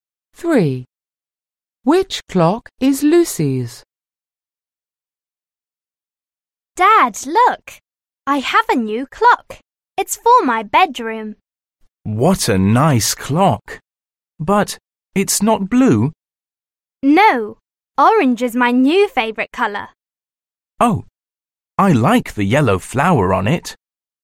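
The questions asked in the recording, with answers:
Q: Which clock is Lucy's?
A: the orange clock with a yellow flower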